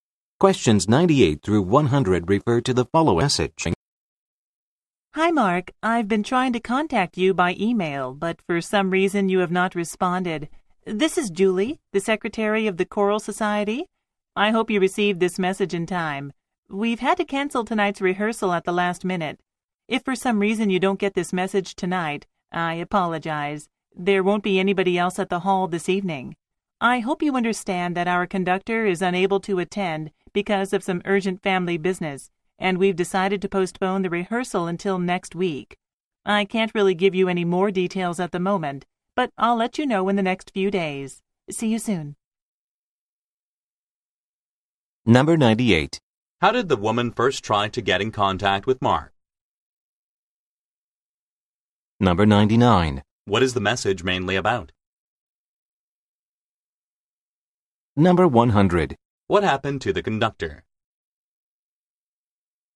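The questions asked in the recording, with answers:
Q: How did the woman first try to get in contact with Mark?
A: By email

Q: What is the message mainly about?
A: Tonight's rehearsal has been cancelled

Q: What happened to the conductor?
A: He has urgent family business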